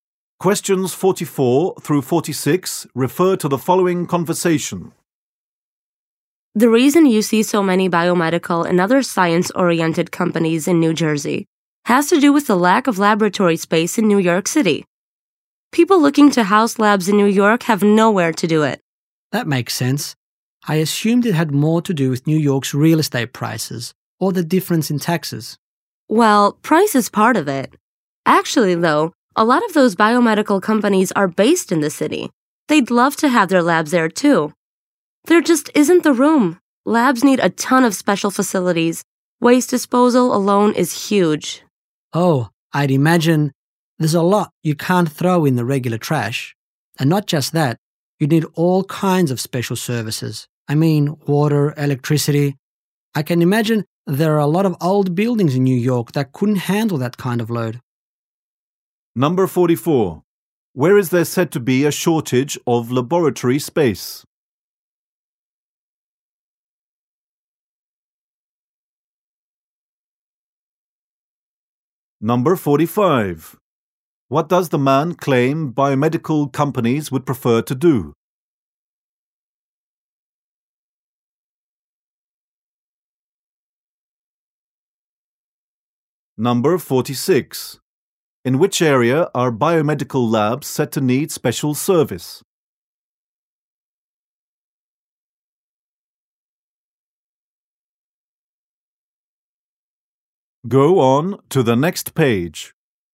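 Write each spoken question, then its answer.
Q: Where is there said to be a shortage of laboratory space?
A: New York City

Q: What does the man claim biomedical companies would prefer to do?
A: Have their labs in New York City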